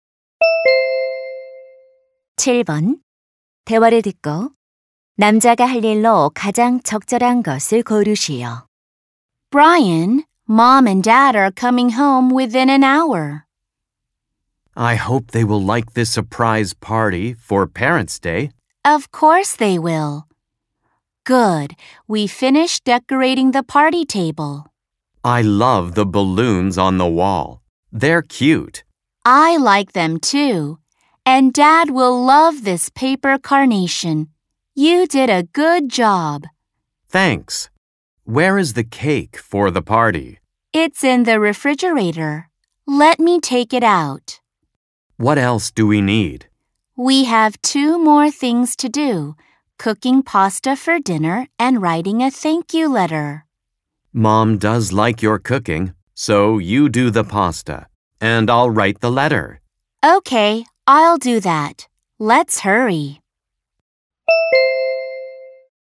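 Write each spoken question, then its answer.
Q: 대화를 듣고 남자가 할 일로 가장 적절한 것을 고르시오.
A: 감사 편지 쓰기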